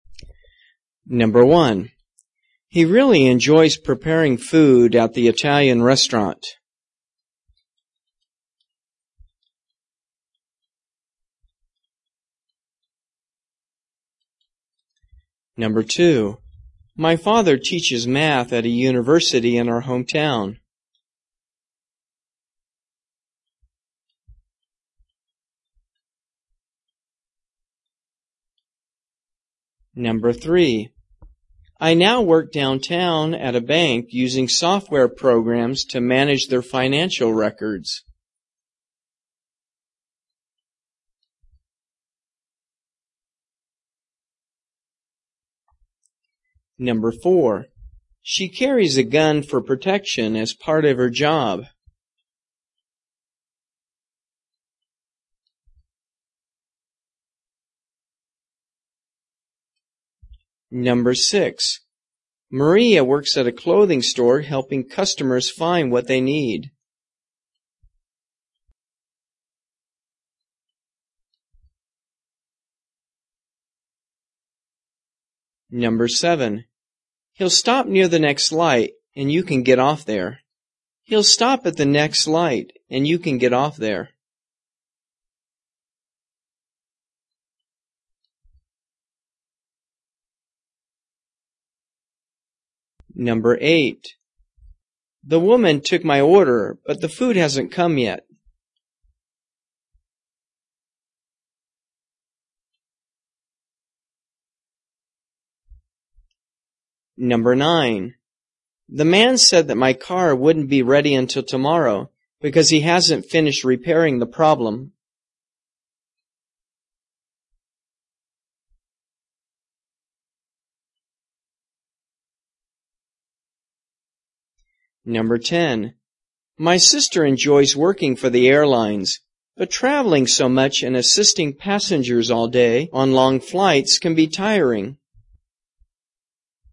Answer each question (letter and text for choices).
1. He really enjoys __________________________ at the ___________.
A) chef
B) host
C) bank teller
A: A) chef

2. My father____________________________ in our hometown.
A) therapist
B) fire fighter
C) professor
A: C) professor

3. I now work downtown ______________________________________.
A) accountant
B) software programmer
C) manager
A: A) accountant

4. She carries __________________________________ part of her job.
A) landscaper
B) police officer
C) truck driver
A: B) police officer

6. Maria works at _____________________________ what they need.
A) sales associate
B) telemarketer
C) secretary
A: A) sales associate

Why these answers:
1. He really enjoys preparing food at the Italian restaurant. (chef)
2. My father teaches math at a university in our hometown. (professor)
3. I now work downtown at a bank using software programs to manage their financial records. (accountant)
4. She carries a gun for protection as part of her job. (police officer)
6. Maria works at a clothing store helping customers find what they need. (sales associate)

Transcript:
1 He really enjoys preparing food at the Italian restaurant. (chef)
2 My father teaches math at a university in our hometown. (professor)
3 I now work downtown at a bank using software programs to manage their financial records.
4 She carries a gun for protection as part of her job. (police officer)
6 Maria works at a clothing store helping customers find what they need.
7 He'll stop near the next light, and you can get off there.
8 The woman took my order, but the food hasn't come out yet. (server)
9 The man said that my car wouldn't be ready until tomorrow because he hasn't finished repairing the problem.
10 My sister enjoys working for the airlines, but traveling so much and assisting passengers all day on long flights can be tiring.

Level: 中级